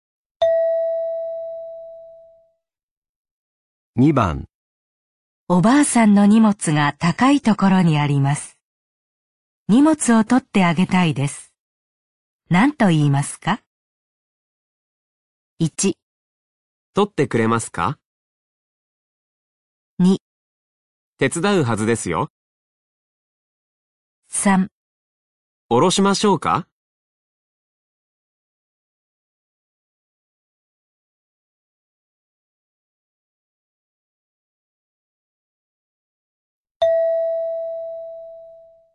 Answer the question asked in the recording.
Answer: 3

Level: N3 Listening · Test 12